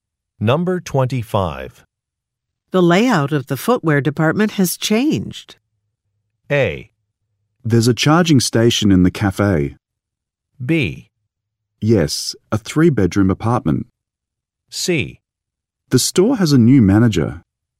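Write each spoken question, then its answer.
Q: The layout of the footwear department has changed.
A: C: The store has a new manager.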